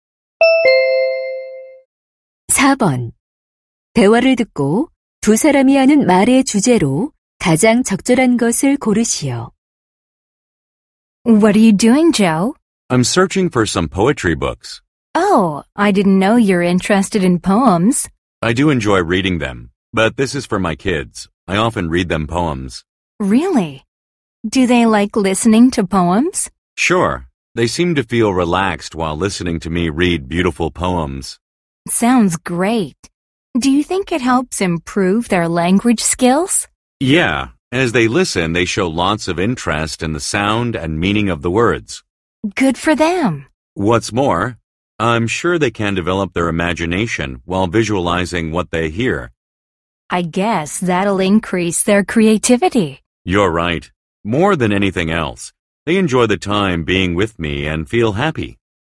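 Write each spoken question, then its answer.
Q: 대화를 듣고 두 사람이 하는 말의 주제로 가장 적절한 것을 고르시오.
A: 아이들에게 시를 읽어 주는 것의 좋은 점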